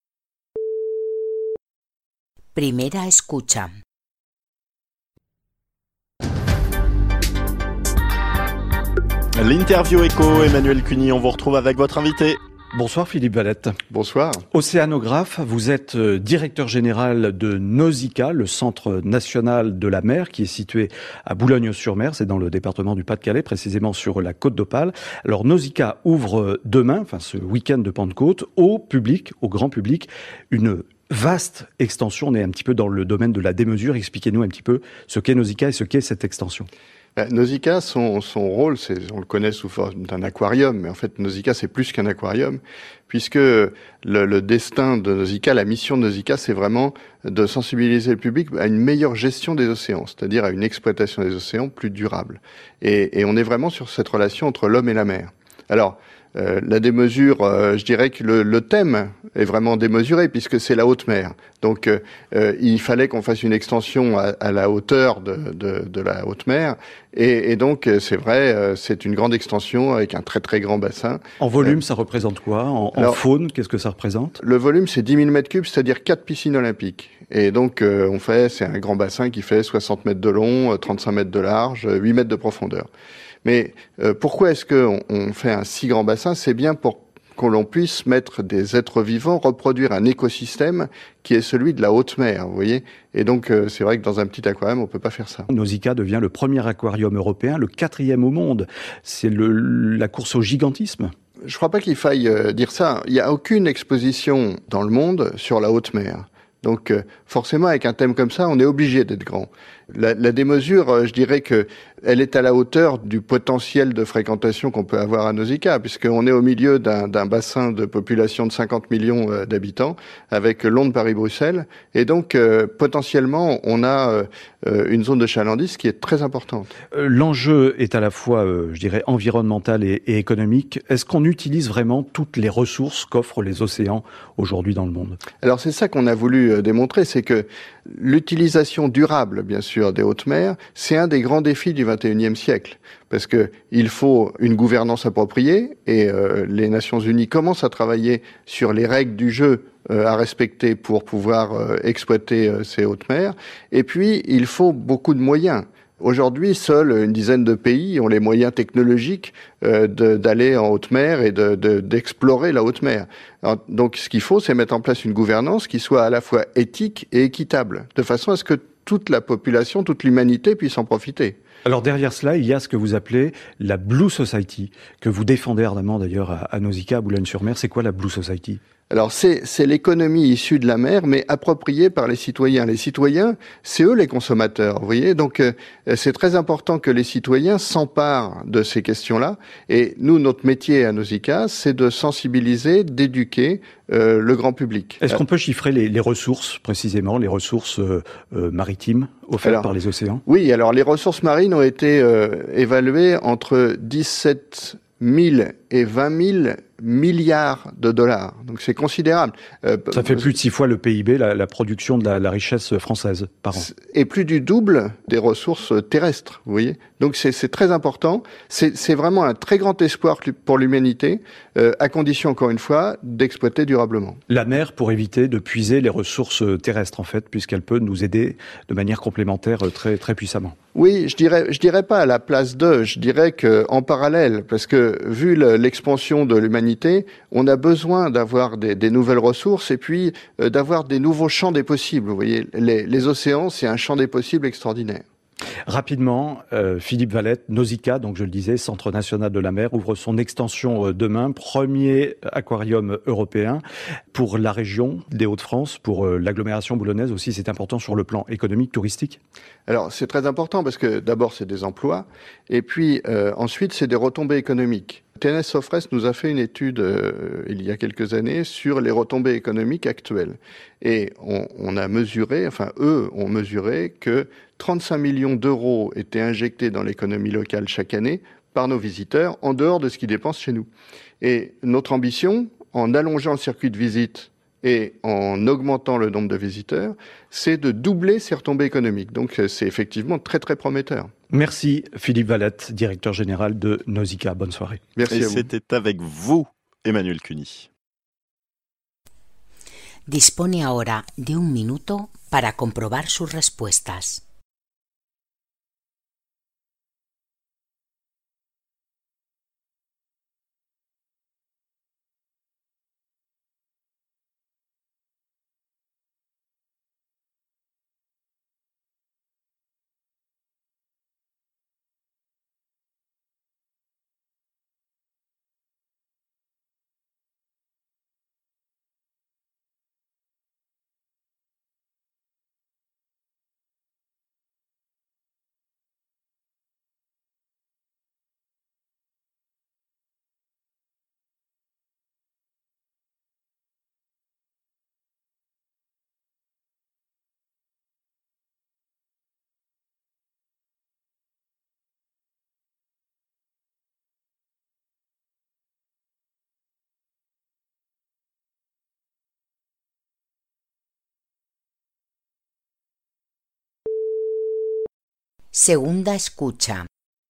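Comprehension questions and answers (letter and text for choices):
TAREA 2 - 10 puntos: Vous allez écouter trois fois un extrait d'une émission de France info. Choisissez l'option correcte (a, b ou c) pour compléter l'affirmation proposée, comme dans l'exemple.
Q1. La mission de Nausicaà est de...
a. montrer au public la relation entre l'homme et la mer.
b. conserver dans un aquarium les espèces marines protégées.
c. rendre sensible les visiteurs à une exploitation des océans plus durable.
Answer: c. rendre sensible les visiteurs à une exploitation des océans plus durable.

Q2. Le volume du nouveau bassin est de...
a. 6.000 m3.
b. quatre piscines olympiques.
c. 160 mètres de long, 35 mètres de large et 18 mètres de profondeur.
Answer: b. quatre piscines olympiques.

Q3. On a fait un si grand bassin parce qu'on veut...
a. imiter l'écosystème de la haute mer.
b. introduire un système à base d'eau de mer.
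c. reproduire un milieu où les espèces puissent vivre en liberté.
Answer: a. imiter l'écosystème de la haute mer.

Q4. Nausicaà représente...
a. le plus grand aquarium du monde.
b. une exposition démesurée sur la faune des mers.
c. la première exposition dans le monde sur la haute mer.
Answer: c. la première exposition dans le monde sur la haute mer.

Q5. Le potentiel de fréquentation de Nausicaà est très grand, car...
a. dans la zone il y a 60 millions d'habitants.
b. Il se trouve entre Londres, Paris et Bruxelles.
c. Il peut accueillir près de 50 millions de visiteurs par an.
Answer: b. Il se trouve entre Londres, Paris et Bruxelles.

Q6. L'utilisation des hautes mers est un grand défi du XXIe siècle, en ce sens...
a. les Nations Unies ont déjà mis en place des lois très strictes.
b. il y a une vingtaine de pays qui ont les moyens technologiques pour le faire.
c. il faudrait mettre en place un système pour que tout le monde puisse en profiter.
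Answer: c. il faudrait mettre en place un système pour que tout le monde puisse en profiter.

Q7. La "blue society" concerne...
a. le public qui vient visiter Nausicaà.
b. les citoyens sensibles aux ressources de la mer.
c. les entreprises qui ont des moyens économiques pour l'exploitation de la haute mer.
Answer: b. les citoyens sensibles aux ressources de la mer.

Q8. Les ressources marines représentent...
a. plus de six fois le PIB de France.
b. plus de trois fois la richesse terrestre.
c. entre 17.000 et 22.000 milliards de dollars.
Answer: a. plus de six fois le PIB de France.

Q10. Nausicaà est important pour la région de Hauts-de-France, car...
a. l'économie de la région est en baisse ces dernières années.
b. ils ont l'intention de doubler le nombre d'espèces dans l'aquarium.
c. les visiteurs dépensent plus de 30 millions d'euros par an dans la région.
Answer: c. les visiteurs dépensent plus de 30 millions d'euros par an dans la région.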